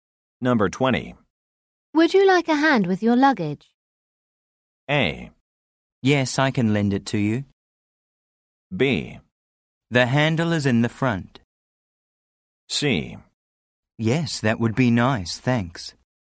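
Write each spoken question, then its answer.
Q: Would you like a hand with your luggage?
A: C: Yes, that would be nice, thanks.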